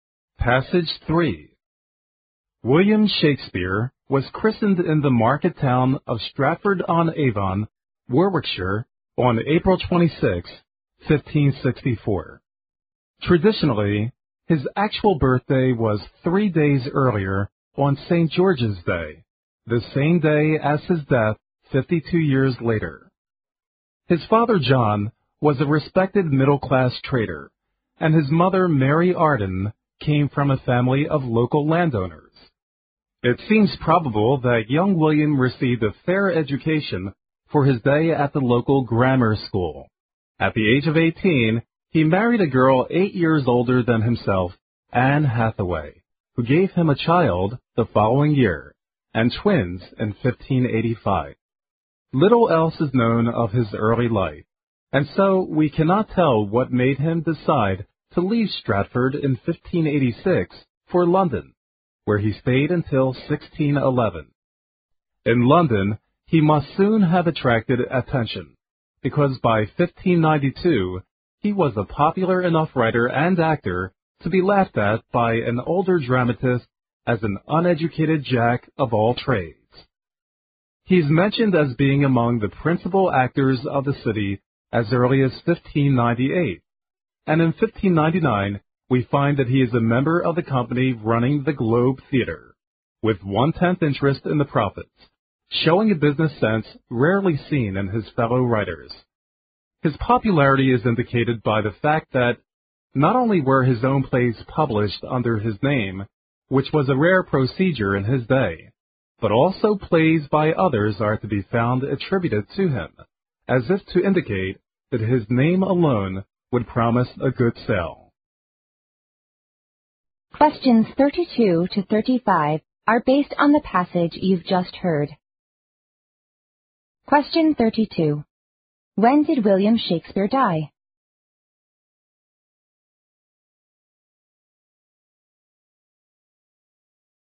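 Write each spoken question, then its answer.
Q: When did William Shakespeare die?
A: On April 23, 1616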